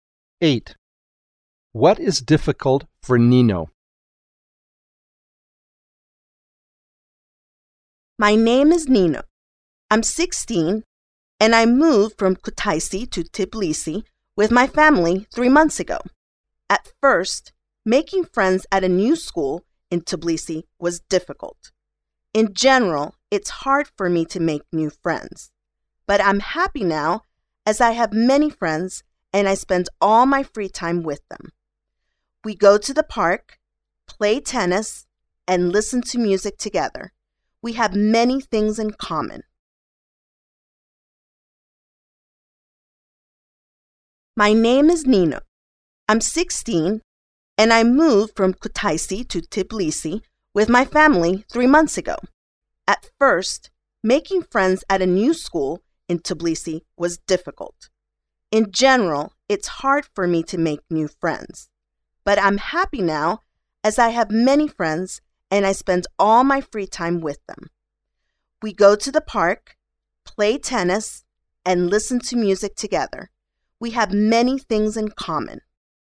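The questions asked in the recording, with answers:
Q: What is difficult for Nino?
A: Making new friends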